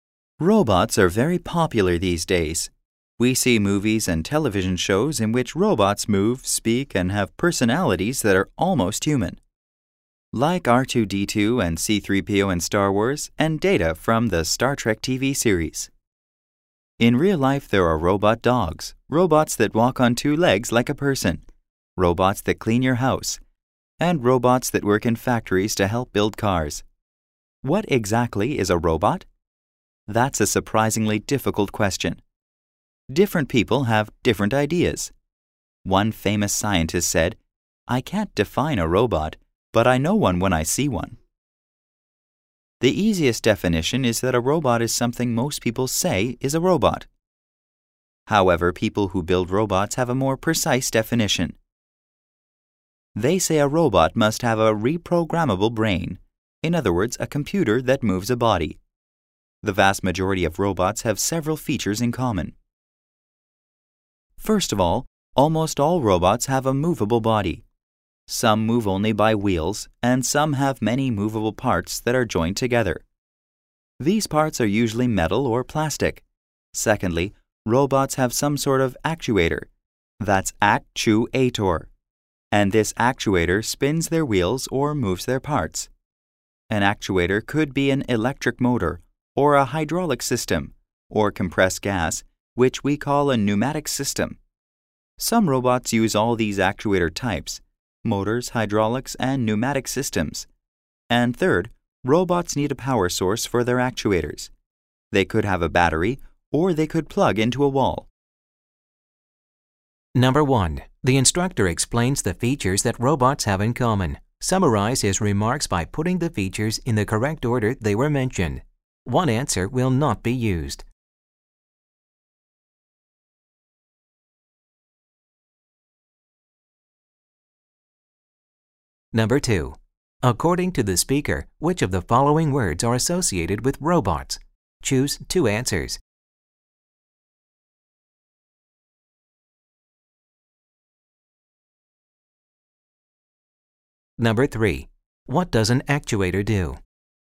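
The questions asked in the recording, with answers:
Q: What does an actuator do?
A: It spins the robot's wheels or moves its parts.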